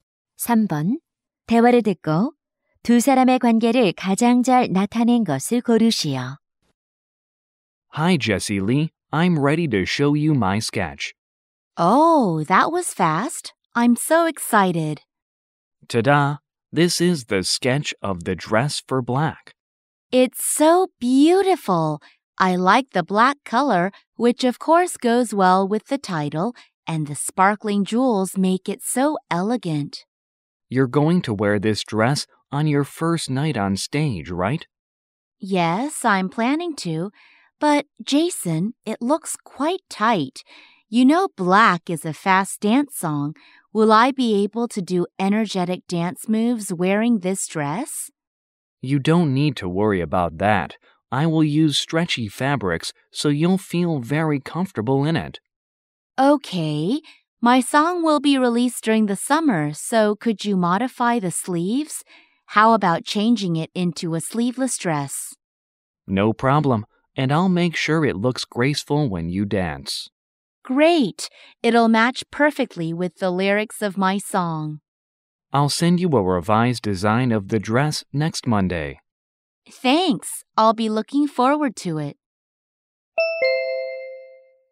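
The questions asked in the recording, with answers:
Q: 대화를 듣고 두 사람의 관계를 가장 잘 나타낸 것을 고르시오.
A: 의상 디자이너 – 가수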